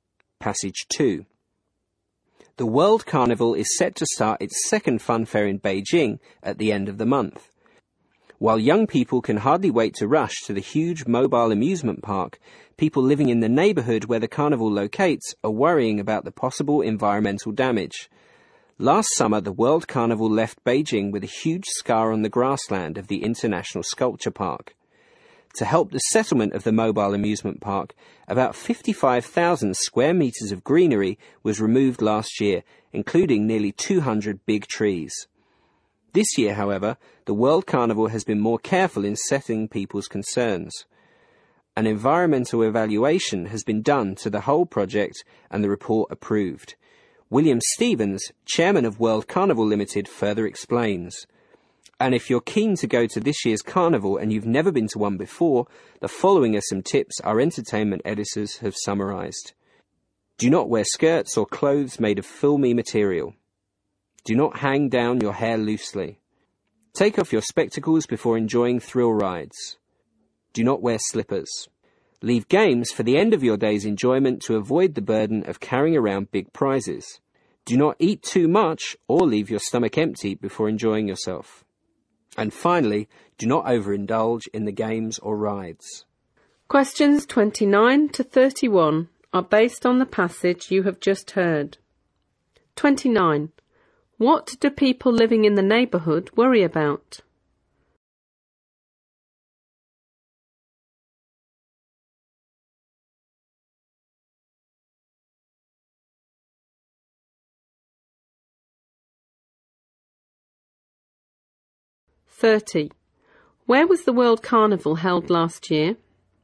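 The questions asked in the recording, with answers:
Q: What do people living in the neighbourhood worry about?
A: Possible environmental damage

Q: Where was the World Carnival held last year?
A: In the International Sculpture Park in Beijing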